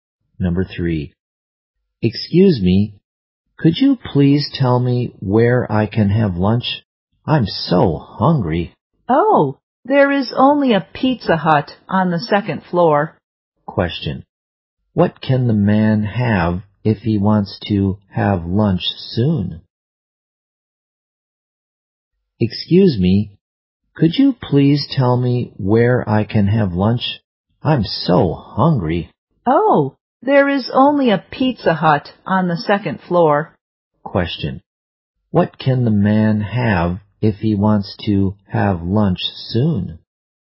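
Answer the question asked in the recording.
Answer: Pizza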